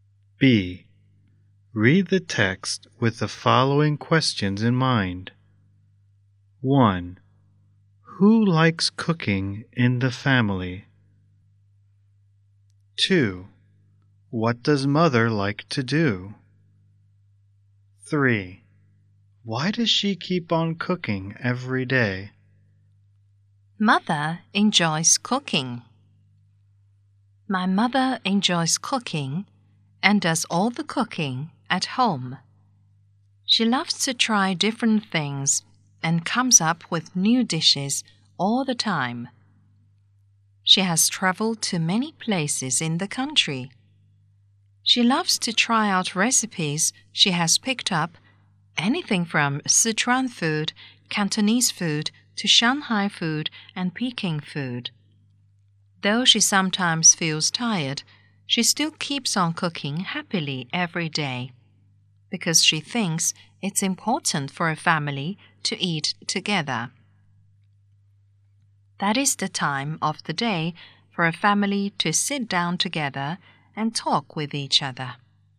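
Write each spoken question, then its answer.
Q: Who likes cooking in the family?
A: Mother

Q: What does mother like to do?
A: Cooking and trying new dishes and recipes

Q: Why does she keep on cooking every day?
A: Because she thinks it's important for a family to eat together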